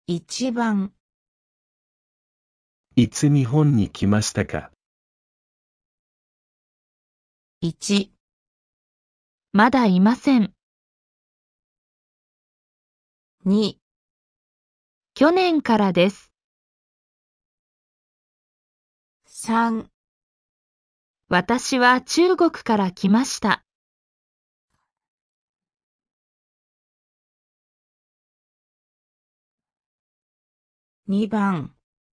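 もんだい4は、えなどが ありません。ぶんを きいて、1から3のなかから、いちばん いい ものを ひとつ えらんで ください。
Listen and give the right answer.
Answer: 2

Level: N5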